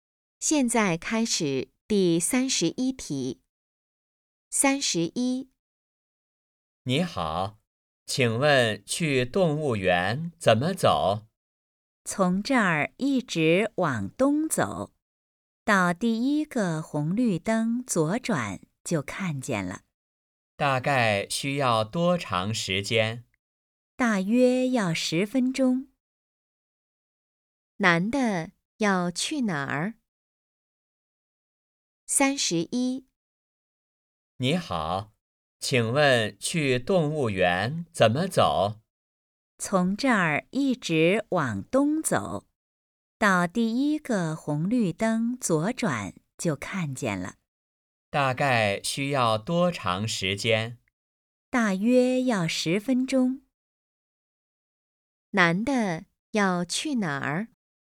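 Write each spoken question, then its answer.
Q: 男的要去哪儿?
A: 动物园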